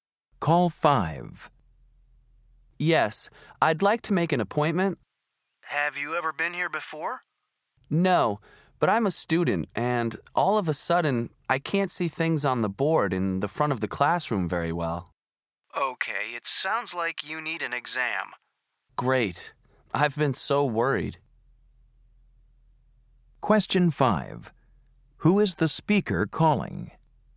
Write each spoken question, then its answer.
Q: Who is the speaker calling?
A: Eye clinic. This is Sean.